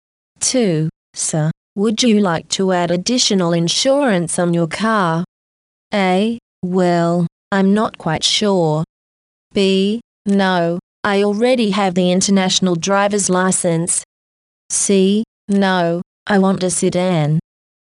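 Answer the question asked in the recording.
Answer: A: Well, I'm not quite sure.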